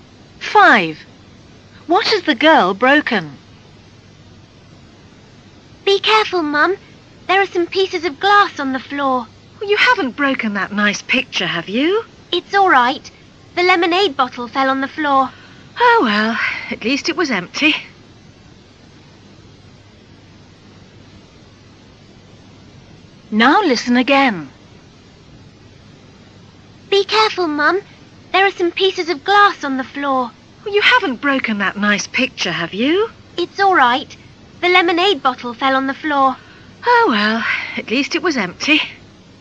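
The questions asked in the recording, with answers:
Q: What has the girl broken?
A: A lemonade bottle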